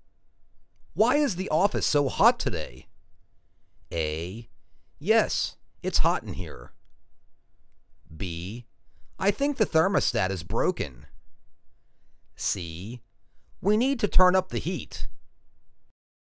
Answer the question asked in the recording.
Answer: I think the thermostat is broken.